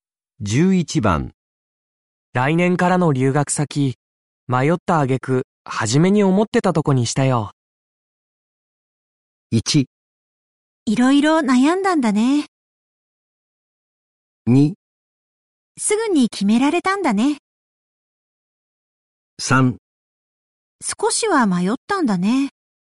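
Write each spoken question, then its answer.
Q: 来年からの留学先、迷った挙句、初めに思ってたとこにしたよ。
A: 1: いろいろ悩んだんだね。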